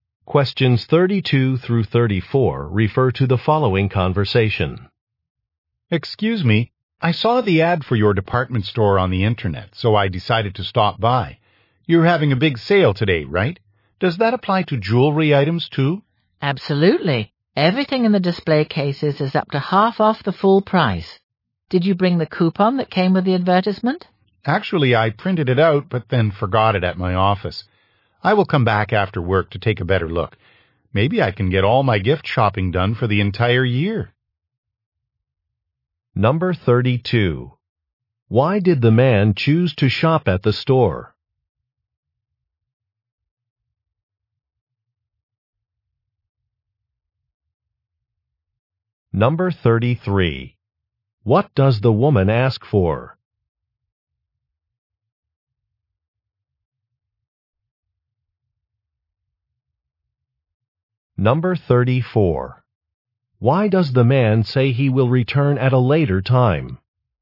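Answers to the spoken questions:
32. He saw the store's ad on the internet (a big sale)
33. The coupon from the advertisement
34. He forgot the coupon at his office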